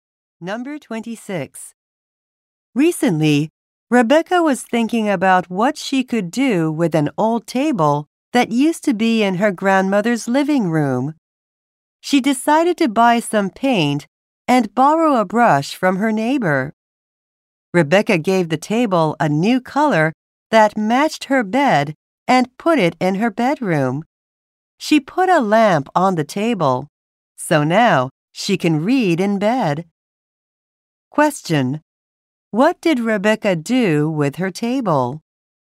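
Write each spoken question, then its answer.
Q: What did Rebecca do with her table?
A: Painted it and put it in her bedroom.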